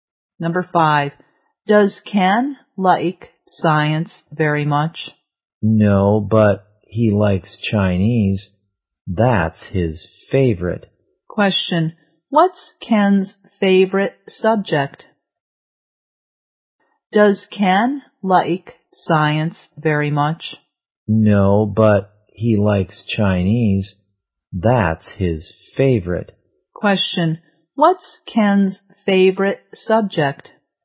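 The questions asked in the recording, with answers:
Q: what's Ken's favorite subject?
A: Chinese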